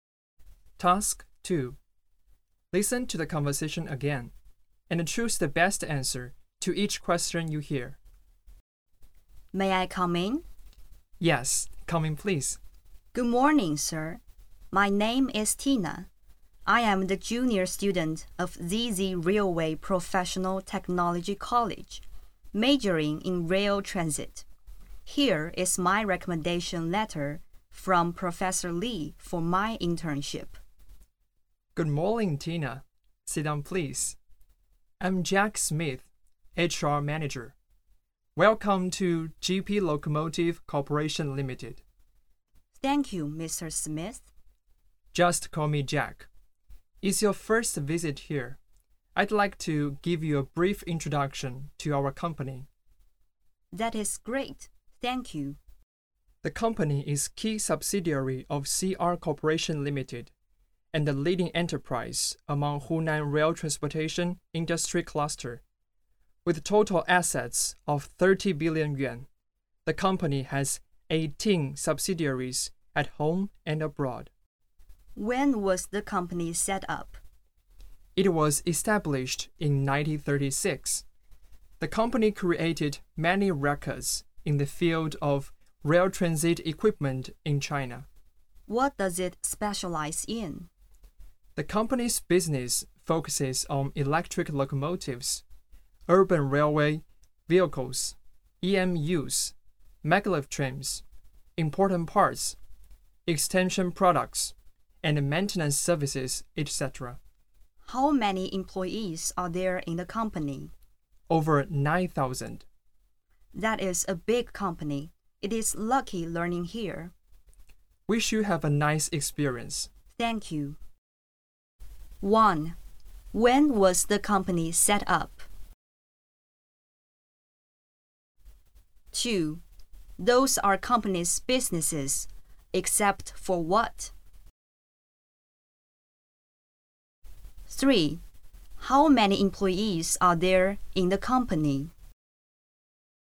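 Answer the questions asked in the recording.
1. In 1936
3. Over 9,000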